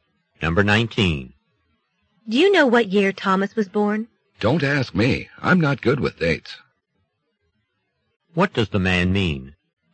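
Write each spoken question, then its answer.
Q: What does the man mean?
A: He doesn't know when Thomas was born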